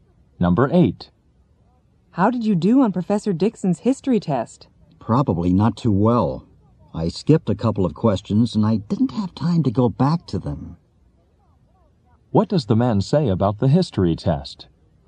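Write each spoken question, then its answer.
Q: What does the man say about the history test?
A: He probably did poorly because he skipped questions and ran out of time.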